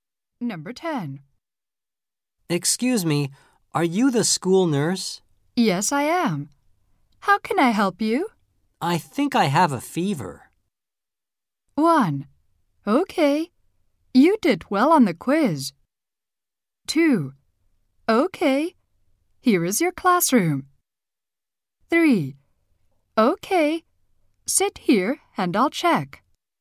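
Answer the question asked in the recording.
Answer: 3: Okay. Sit here and I'll check.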